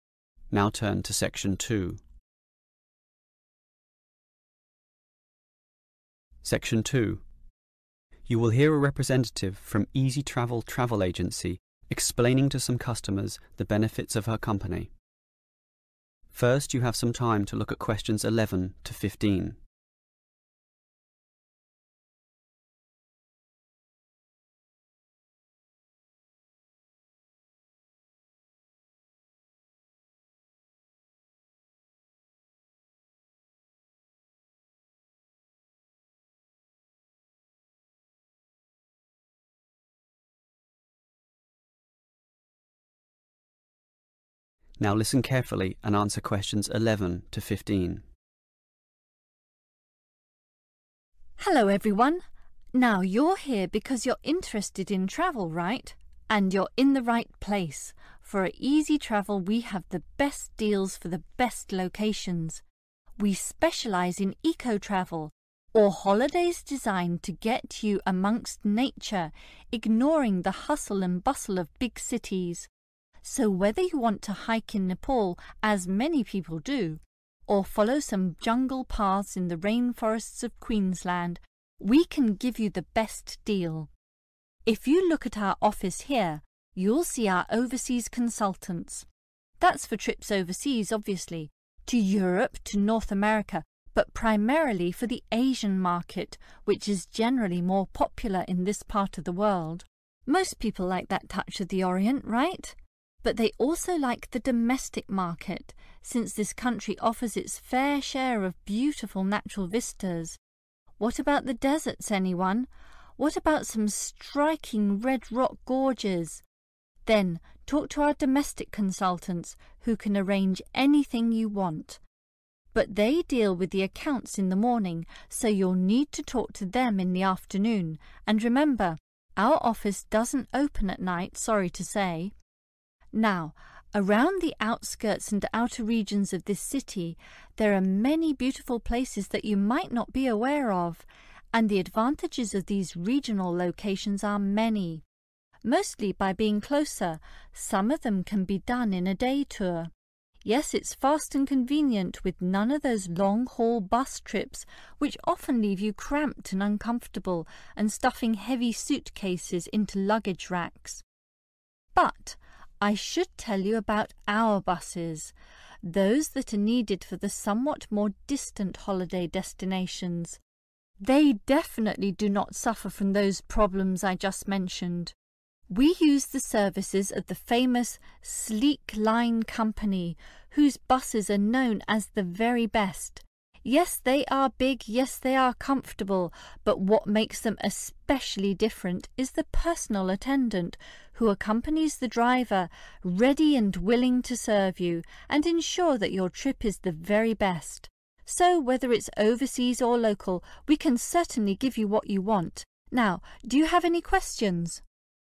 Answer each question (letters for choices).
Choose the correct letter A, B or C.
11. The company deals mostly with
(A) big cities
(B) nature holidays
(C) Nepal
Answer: B

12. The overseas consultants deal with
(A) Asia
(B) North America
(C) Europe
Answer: A

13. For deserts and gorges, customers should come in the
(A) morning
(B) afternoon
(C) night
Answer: B

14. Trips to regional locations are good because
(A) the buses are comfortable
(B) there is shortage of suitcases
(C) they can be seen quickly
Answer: C

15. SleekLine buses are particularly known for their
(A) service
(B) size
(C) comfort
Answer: A